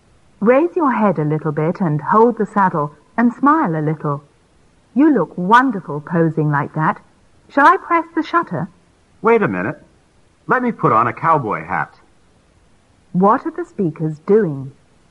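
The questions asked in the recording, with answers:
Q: What are the speakers doing?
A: Taking a photo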